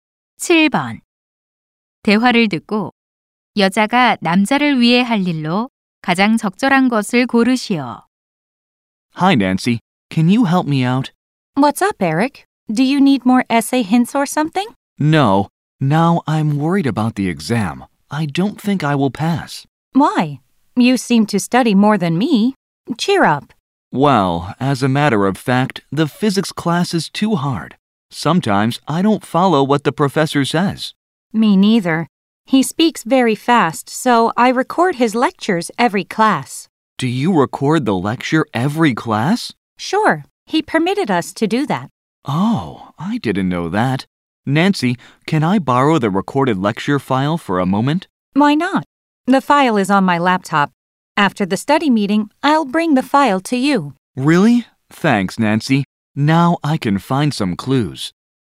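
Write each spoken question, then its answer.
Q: 대화를 듣고 여자가 남자를 위해 할 일로 가장 적절한 것을 고르시오.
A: 녹음한 강의 파일 가져다주기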